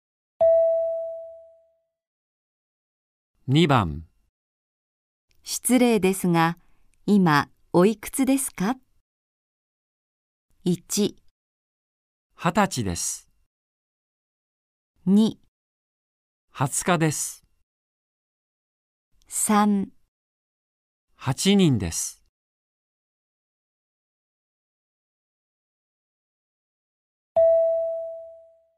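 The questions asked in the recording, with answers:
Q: 失礼ですが、今おいくつですか?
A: 1: 二十歳です。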